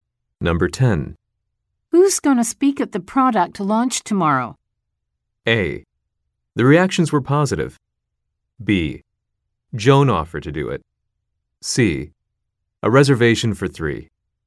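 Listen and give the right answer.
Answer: B: Joan offered to do it.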